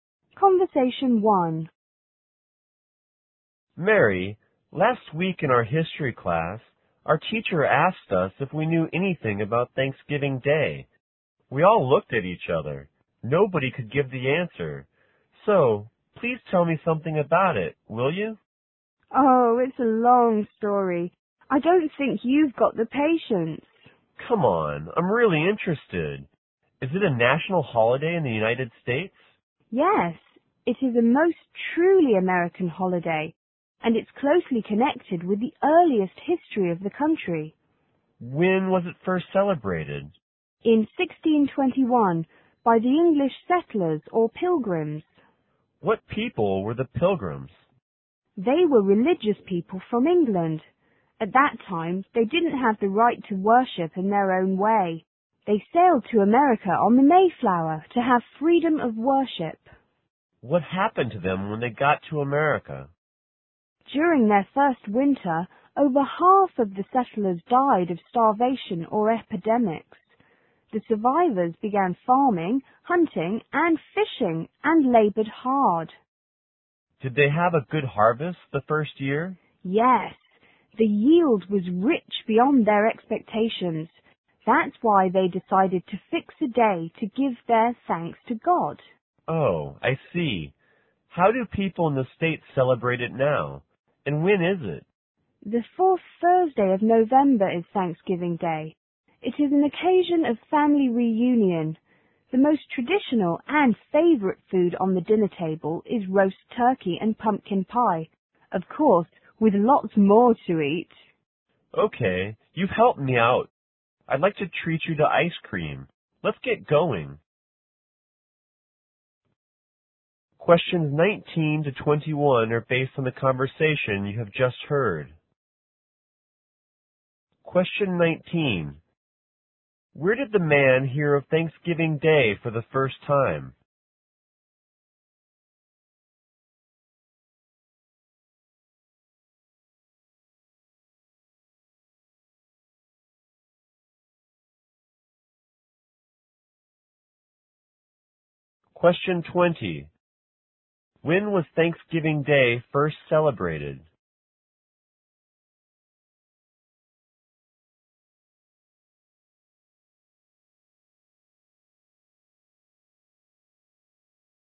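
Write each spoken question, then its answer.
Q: Where did the man hear of Thanksgiving Day for the first time?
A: In his history class

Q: When was Thanksgiving Day first celebrated?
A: In 1621

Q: What people were the pilgrims?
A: Religious people from England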